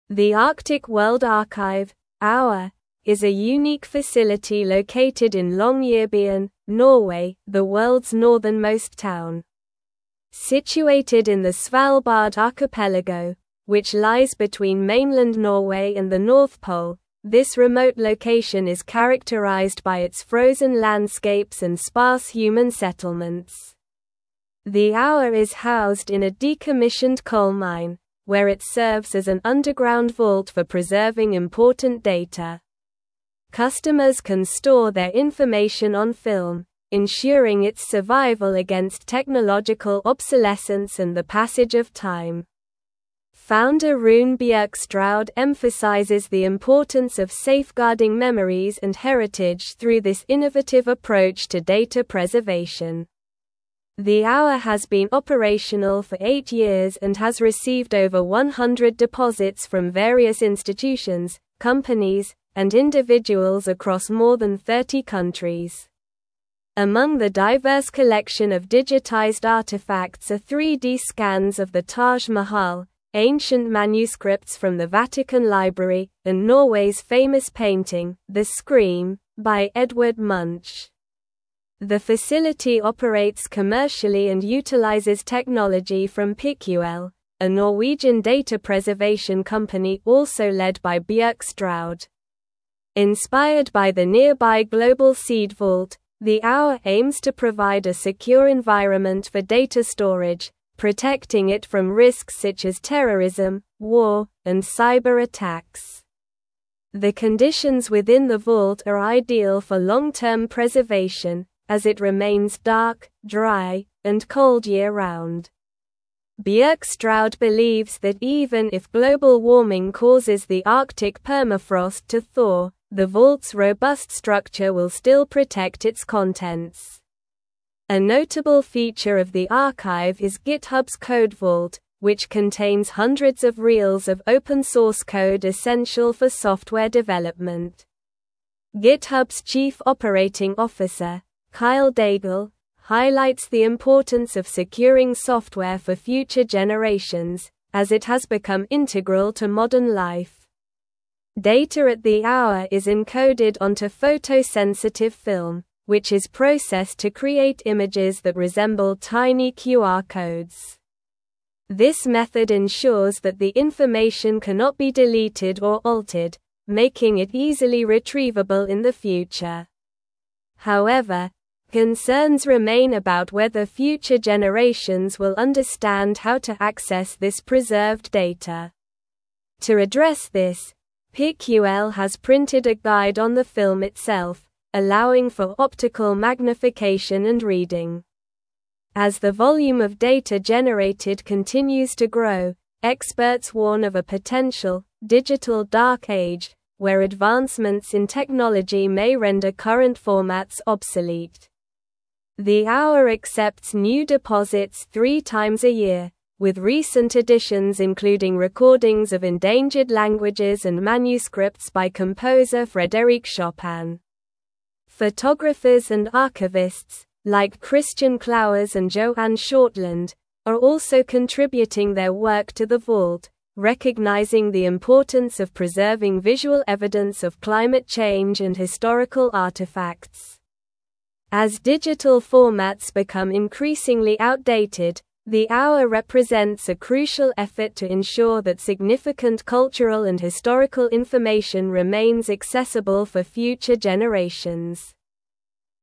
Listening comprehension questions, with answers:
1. Situated in the Svalbard archipelago, which lies between (1)______ Norway and the North Pole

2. where it serves as an underground vault for preserving (2)______ data.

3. ensuring its survival against technological (3)______ and the passage of time.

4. has received over 100 (4)______ from various institutions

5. Among the diverse collection of digitized artifacts are 3D (5)______ of the Taj Mahal,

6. (6)______ manuscripts from the Vatican Library,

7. "The Scream" by (7)______ Munch.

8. the AWA aims to provide a secure (8)______ for data storage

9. highlights the importance of securing software for (9)______ generations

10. This method ensures that the (10)______ cannot be (11)______ or altered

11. This method ensures that the (10)______ cannot be (11)______ or altered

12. whether future generations will understand how to (12)______ this preserved data.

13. allowing for optical (13)______ and reading.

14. (14)______ warn of a potential "digital Dark Age,"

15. where advancements in (15)______ may render current (16)______ obsolete.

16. where advancements in (15)______ may render current (16)______ obsolete.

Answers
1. mainland
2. important
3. obsolescence
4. deposits
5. scans
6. ancient
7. Edvard
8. environment
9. future
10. information
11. deleted
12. access
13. magnification
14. experts
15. technology
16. formats

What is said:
The Arctic World Archive (AWA) is a unique facility located in Longyearbyen, Norway, the world's northernmost town. Situated in the Svalbard archipelago, which lies between mainland Norway and the North Pole, this remote location is characterized by its frozen landscapes and sparse human settlements. The AWA is housed in a decommissioned coal mine, where it serves as an underground vault for preserving important data. Customers can store their information on film, ensuring its survival against technological obsolescence and the passage of time. Founder Rune Bjerkestrand emphasizes the importance of safeguarding memories and heritage through this innovative approach to data preservation.
The AWA has been operational for eight years and has received over 100 deposits from various institutions, companies, and individuals across more than 30 countries. Among the diverse collection of digitized artifacts are 3D scans of the Taj Mahal, ancient manuscripts from the Vatican Library, and Norway's famous painting, "The Scream" by Edvard Munch. The facility operates commercially and utilizes technology from Piql, a Norwegian data preservation company also led by Bjerkestrand. Inspired by the nearby Global Seed Vault, the AWA aims to provide a secure environment for data storage, protecting it from risks such as terrorism, war, and cyberattacks.
The conditions within the vault are ideal for long-term preservation, as it remains dark, dry, and cold year-round. Bjerkestrand believes that even if global warming causes the Arctic permafrost to thaw, the vault's robust structure will still protect its contents. A notable feature of the archive is GitHub's Code Vault, which contains hundreds of reels of open-source code essential for software development. GitHub's chief operating officer, Kyle Daigle, highlights the importance of securing software for future generations, as it has become integral to modern life.
Data at the AWA is encoded onto photosensitive film, which is processed to create images that resemble tiny QR codes. This method ensures that the information cannot be deleted or altered, making it easily retrievable in the future. However, concerns remain about whether future generations will understand how to access this preserved data. To address this, Piql has printed a guide on the film itself, allowing for optical magnification and reading. As the volume of data generated continues to grow, experts warn of a potential "digital Dark Age," where advancements in technology may render current formats obsolete.
The AWA accepts new deposits three times a year, with recent additions including recordings of endangered languages and manuscripts by composer Frédéric Chopin. Photographers and archivists, like Christian Clauwers and Joanne Shortland, are also contributing their work to the vault, recognizing the importance of preserving visual evidence of climate change and historical artifacts. As digital formats become increasingly outdated, the AWA represents a crucial effort to ensure that significant cultural and historical information remains accessible for future generations.

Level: Level 4